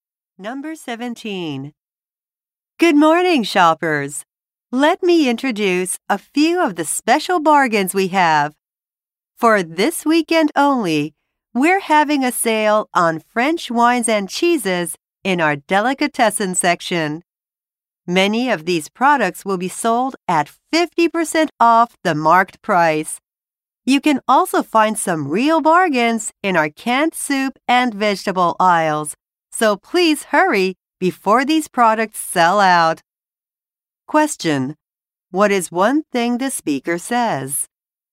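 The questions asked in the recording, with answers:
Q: What is one thing the speaker says?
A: French wines and cheeses are on sale this weekend.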